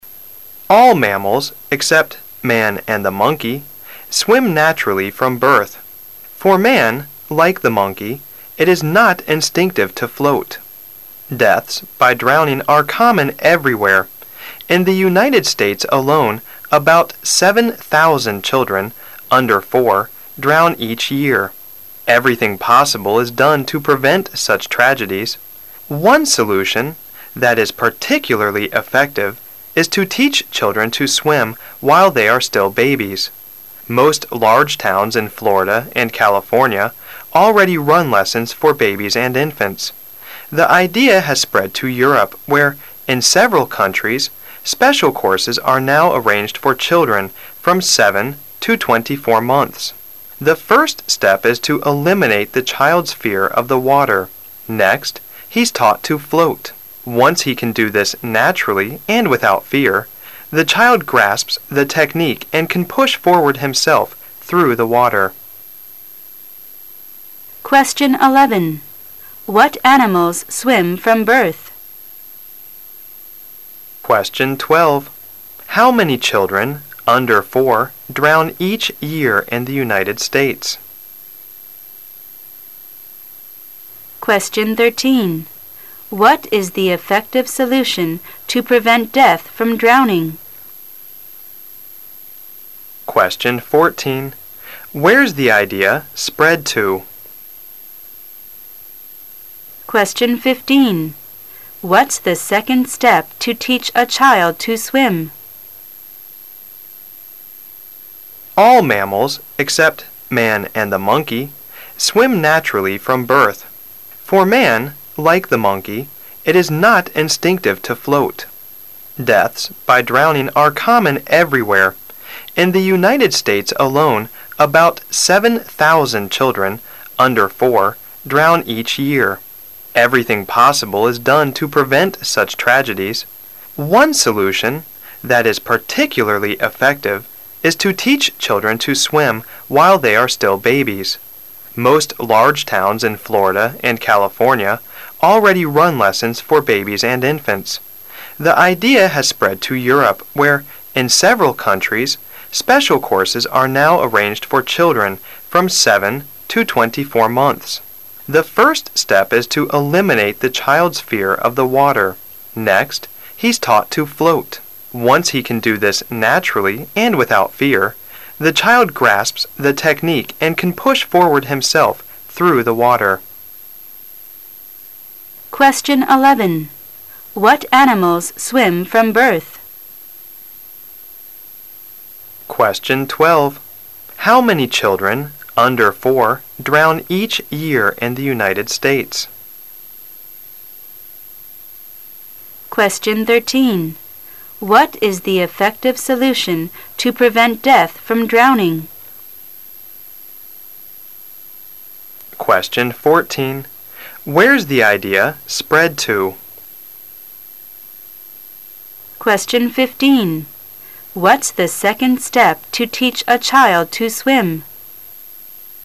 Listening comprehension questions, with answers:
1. What animals swim from birth? All mammals except man and ______.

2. How many children under four drawn each year in the United States?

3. What is the effective solution to prevent death from drowning? To teach the babies to ______.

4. where' s the idea spread to?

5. what' s the second step to teach a child to swim? At the second step, the child is taught to ______.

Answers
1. the monkey
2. About 7,000
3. swim
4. Europe
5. float

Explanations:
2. 由In the United States a lone...可知是大约七千人。
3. 由文中"One solution....is to teach children to swim...."可知。
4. 由文中The idea has spread to Europe可知。
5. 由文中的Next,he's taught to float可知。

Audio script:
the monkey
[解析] 11-15 (Q11)All mammals, except man and the monkey, swim naturally from birth. For man, like the monkey, it is not instinctive to float. Deaths by drowning are common everywhere. (Q12) In the United States alone, about 7,000 children under four drown each year. Everything possible is done to prevent such tragedies. (Q13) One solution that is particularly effective is to teach children to swim while they are still babies. Most large towns in Florida and California already run lessons for babies and infants. (Q14) The idea has spread: to Europe where, in several countries, special courses are now arranged for children from seven to twenty-four months. (Q15) The first step is to eliminate the child' s fear of the water. Next, he' s taught to float. Once he can do this naturally and without fear, the child grasps the technique and can push forward himself through the water. Q11: What animals swim from birth?
About 7,000
[解析] How many children under four drown each year in the United States?
[解析] What is the effective solution to prevent death from drowning?